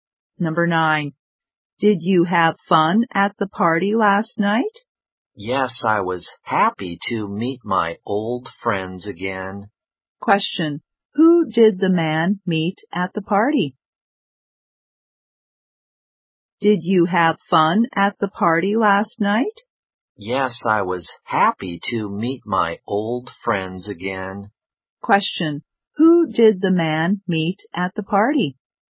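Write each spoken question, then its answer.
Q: Question, who did the man meet at the party?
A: His old friends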